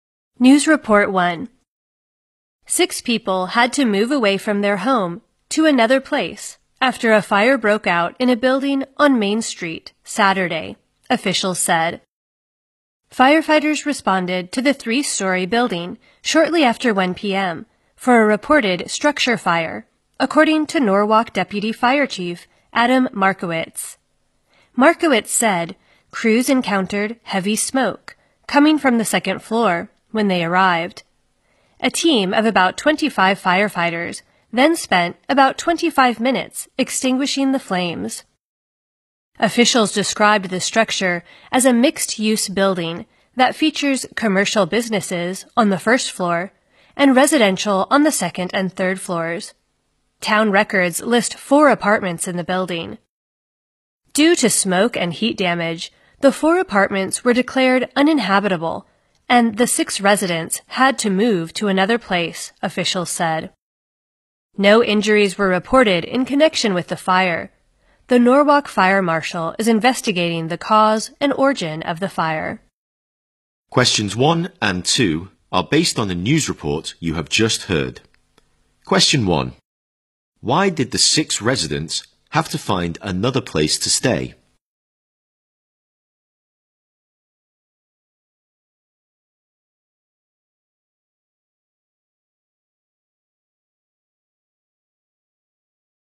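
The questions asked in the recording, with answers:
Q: Why did the 6 residents have to find another place to stay?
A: Smoke and heat damage made their apartments uninhabitable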